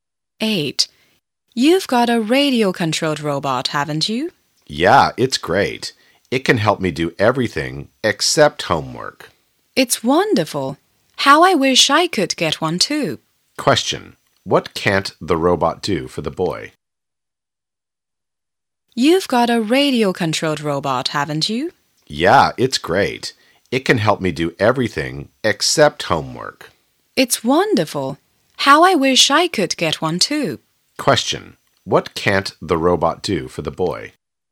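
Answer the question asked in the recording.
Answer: Help him do his homework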